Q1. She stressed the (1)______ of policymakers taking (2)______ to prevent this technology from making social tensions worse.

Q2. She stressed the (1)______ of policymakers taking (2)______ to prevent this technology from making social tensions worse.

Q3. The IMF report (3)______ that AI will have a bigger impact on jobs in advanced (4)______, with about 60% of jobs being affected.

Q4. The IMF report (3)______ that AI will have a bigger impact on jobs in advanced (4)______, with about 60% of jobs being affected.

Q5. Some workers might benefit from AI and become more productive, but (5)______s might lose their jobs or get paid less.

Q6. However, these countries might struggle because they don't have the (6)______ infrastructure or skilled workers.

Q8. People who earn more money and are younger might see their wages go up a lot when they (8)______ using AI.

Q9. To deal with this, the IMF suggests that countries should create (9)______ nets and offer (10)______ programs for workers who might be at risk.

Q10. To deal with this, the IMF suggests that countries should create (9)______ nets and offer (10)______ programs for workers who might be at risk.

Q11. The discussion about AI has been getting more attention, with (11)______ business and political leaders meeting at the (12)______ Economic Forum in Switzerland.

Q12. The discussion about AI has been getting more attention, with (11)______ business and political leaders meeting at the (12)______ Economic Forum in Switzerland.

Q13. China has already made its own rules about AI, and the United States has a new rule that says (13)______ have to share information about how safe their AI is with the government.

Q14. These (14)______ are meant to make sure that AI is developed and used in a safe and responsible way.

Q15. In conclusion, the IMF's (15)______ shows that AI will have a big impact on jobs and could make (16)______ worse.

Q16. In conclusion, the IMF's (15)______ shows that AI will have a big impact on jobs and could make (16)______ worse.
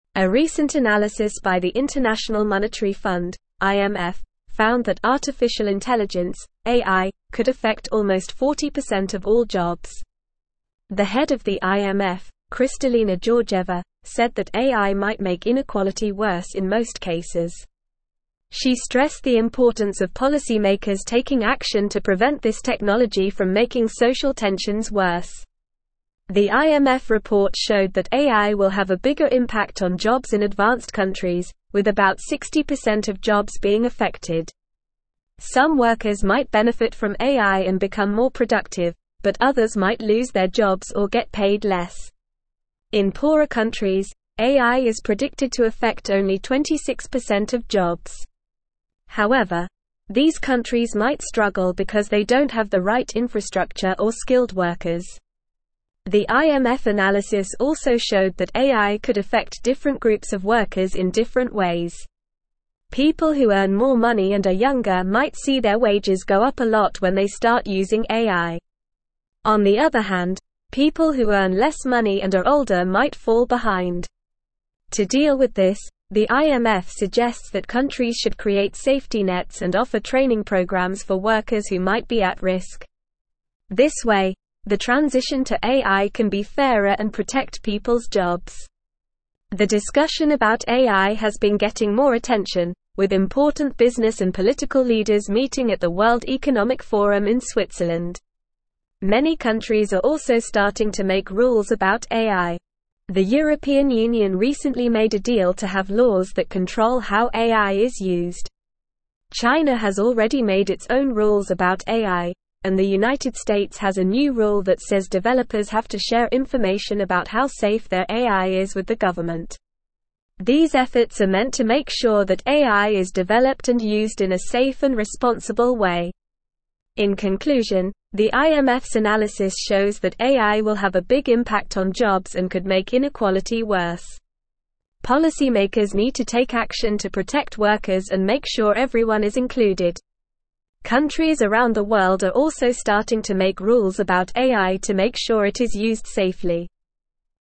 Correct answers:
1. importance
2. action
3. showed
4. countries
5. other
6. right
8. start
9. safety
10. training
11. important
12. World
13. developers
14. efforts
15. analysis
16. inequality

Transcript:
A recent analysis by the International Monetary Fund (IMF) found that artificial intelligence (AI) could affect almost 40% of all jobs. The head of the IMF, Kristalina Georgieva, said that AI might make inequality worse in most cases. She stressed the importance of policymakers taking action to prevent this technology from making social tensions worse. The IMF report showed that AI will have a bigger impact on jobs in advanced countries, with about 60% of jobs being affected. Some workers might benefit from AI and become more productive, but others might lose their jobs or get paid less. In poorer countries, AI is predicted to affect only 26% of jobs. However, these countries might struggle because they don't have the right infrastructure or skilled workers.
The IMF analysis also showed that AI could affect different groups of workers in different ways. People who earn more money and are younger might see their wages go up a lot when they start using AI. On the other hand, people who earn less money and are older might fall behind. To deal with this, the IMF suggests that countries should create safety nets and offer training programs for workers who might be at risk. This way, the transition to AI can be fairer and protect people's jobs.
The discussion about AI has been getting more attention, with important business and political leaders meeting at the World Economic Forum in Switzerland. Many countries are also starting to make rules about AI. The European Union recently made a deal to have laws that control how AI is used. China has already made its own rules about AI, and the United States has a new rule that says developers have to share information about how safe their AI is with the government. These efforts are meant to make sure that AI is developed and used in a safe and responsible way.
In conclusion, the IMF's analysis shows that AI will have a big impact on jobs and could make inequality worse. Policymakers need to take action to protect workers and make sure everyone is included. Countries around the world are also starting to make rules about AI to make sure it is used safely.

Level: Level 3